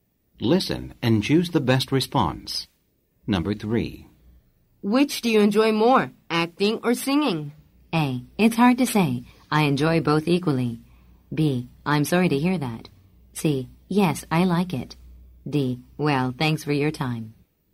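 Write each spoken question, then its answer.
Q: Which do you enjoy more, acting or singing?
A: A: It's hard to say. I enjoy both equally.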